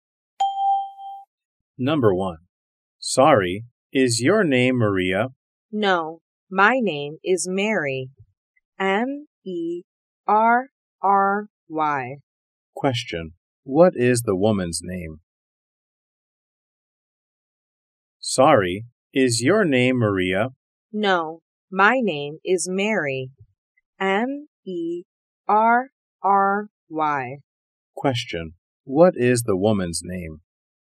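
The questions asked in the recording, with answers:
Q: What is the woman's name?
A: Mary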